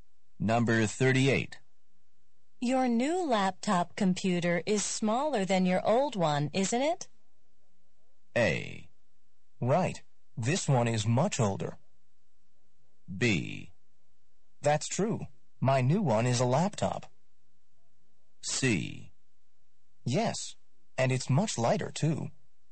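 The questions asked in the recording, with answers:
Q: Your new laptop computer is smaller than your old one, isn't it?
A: C: Yes, and it's much lighter, too.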